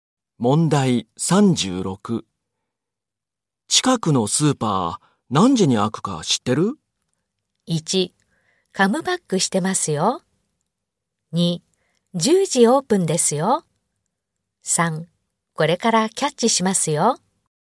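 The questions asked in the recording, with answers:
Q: 近くのスーパー何時に開くか知ってる?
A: 2: 10時オープンですよ。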